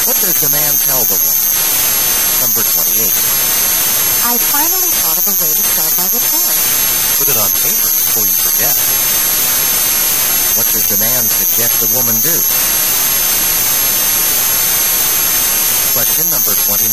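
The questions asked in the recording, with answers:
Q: What does the man suggest the woman do?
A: Write her idea down before she forgets it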